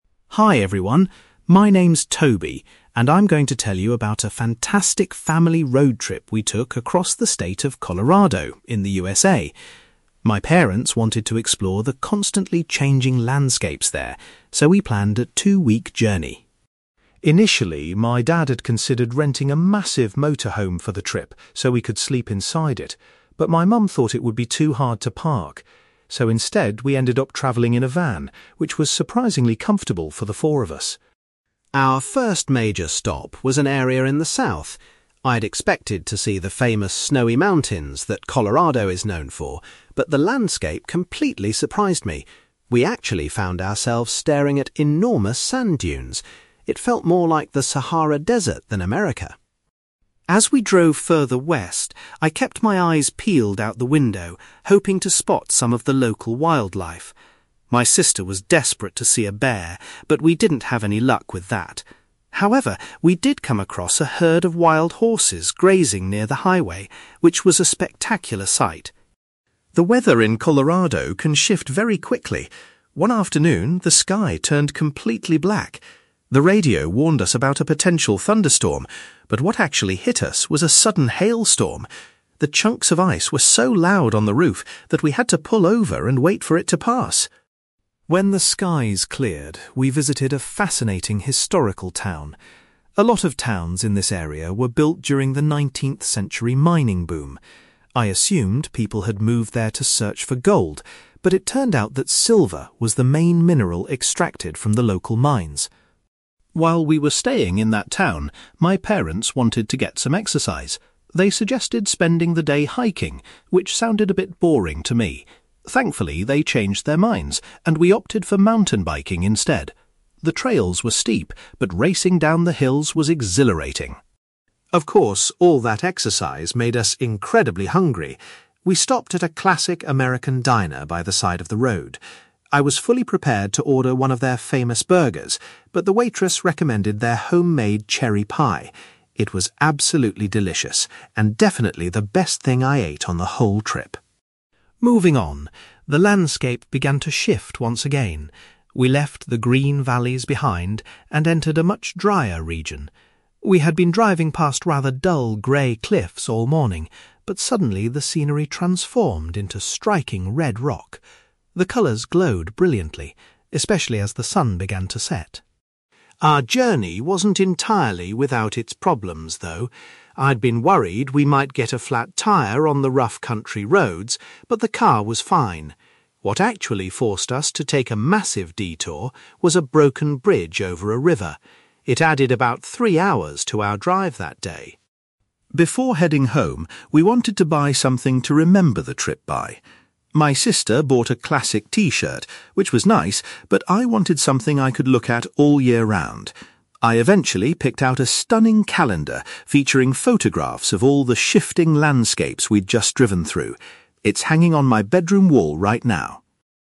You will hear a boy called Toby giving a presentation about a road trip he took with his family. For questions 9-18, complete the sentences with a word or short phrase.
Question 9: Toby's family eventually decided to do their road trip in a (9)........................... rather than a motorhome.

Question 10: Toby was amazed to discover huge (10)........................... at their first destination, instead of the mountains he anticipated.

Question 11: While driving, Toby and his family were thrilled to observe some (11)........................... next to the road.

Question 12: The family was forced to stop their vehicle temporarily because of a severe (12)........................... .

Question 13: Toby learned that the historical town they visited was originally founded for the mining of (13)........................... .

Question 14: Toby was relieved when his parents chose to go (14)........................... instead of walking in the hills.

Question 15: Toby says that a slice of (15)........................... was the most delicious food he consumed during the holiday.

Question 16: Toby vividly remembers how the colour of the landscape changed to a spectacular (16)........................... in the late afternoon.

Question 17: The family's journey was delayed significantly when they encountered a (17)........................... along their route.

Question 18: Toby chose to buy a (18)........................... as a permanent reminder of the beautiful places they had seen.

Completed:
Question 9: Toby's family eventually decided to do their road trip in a van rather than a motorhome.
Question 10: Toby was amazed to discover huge sand dunes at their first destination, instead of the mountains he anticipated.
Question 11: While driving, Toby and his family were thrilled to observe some wild horses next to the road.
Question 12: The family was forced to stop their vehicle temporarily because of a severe hailstorm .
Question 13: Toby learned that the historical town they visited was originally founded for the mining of silver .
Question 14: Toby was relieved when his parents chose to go mountain biking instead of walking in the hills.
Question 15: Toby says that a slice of cherry pie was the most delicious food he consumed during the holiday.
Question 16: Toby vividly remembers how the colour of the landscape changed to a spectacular red rock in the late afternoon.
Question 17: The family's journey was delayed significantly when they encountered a broken bridge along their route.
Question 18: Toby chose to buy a calendar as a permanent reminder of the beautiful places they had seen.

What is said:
Toby: Hi everyone. My name's Toby, and I'm going to tell you about a fantastic family road trip we took across the state of Colorado in the USA. My parents wanted to explore the constantly changing landscapes there, so we planned a two-week journey.
Initially, my dad had considered renting a massive motorhome for the trip so we could sleep inside it, but my mum thought it would be too hard to park. So instead, we ended up travelling in a van, which was surprisingly comfortable for the four of us.
Our first major stop was an area in the south. I'd expected to see the famous snowy mountains that Colorado is known for, but the landscape completely surprised me. We actually found ourselves staring at enormous sand dunes. It felt more like the Sahara Desert than America!
As we drove further west, I kept my eyes peeled out the window, hoping to spot some of the local wildlife. My sister was desperate to see a bear, but we didn't have any luck with that. However, we did come across a herd of wild horses grazing near the highway, which was a spectacular sight.
The weather in Colorado can shift very quickly. One afternoon, the sky turned completely black. The radio warned us about a potential thunderstorm, but what actually hit us was a sudden hailstorm. The chunks of ice were so loud on the roof that we had to pull over and wait for it to pass!
When the skies cleared, we visited a fascinating historical town. A lot of towns in this area were built during the 19th-century mining boom. I assumed people had moved there to search for gold, but it turned out that silver was the main mineral extracted from the local mines.
While we were staying in that town, my parents wanted to get some exercise. They suggested spending the day hiking, which sounded a bit boring to me. Thankfully, they changed their minds and we opted for mountain biking instead. The trails were steep, but racing down the hills was exhilarating.
Of course, all that exercise made us incredibly hungry. We stopped at a classic American diner by the side of the road. I was fully prepared to order one of their famous burgers, but the waitress recommended their homemade cherry pie. It was absolutely delicious and definitely the best thing I ate on the whole trip.
Moving on, the landscape began to shift once again. We left the green valleys behind and entered a much drier region. We had been driving past rather dull grey cliffs all morning, but suddenly the scenery transformed into striking red rock. The colours glowed brilliantly, especially as the sun began to set.
Our journey wasn't entirely without its problems, though. I'd been worried we might get a flat tyre on the rough country roads, but the car was fine. What actually forced us to take a massive detour was a broken bridge over a river. It added about three hours to our drive that day!
Before heading home, we wanted to buy something to remember the trip by. My sister bought a classic t-shirt, which was nice, but I wanted something I could look at all year round. I eventually picked out a stunning calendar featuring photographs of all the shifting landscapes we'd just driven through. It's hanging on my bedroom wall right now!

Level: B2